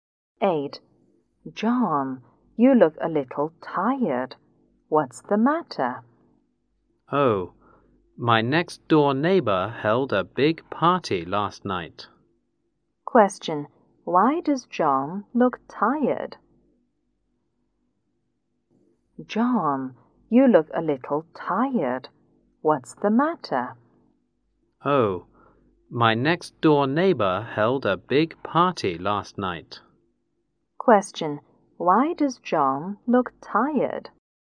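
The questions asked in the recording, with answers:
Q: Why does John look tired?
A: His next door neighbor held a big party last night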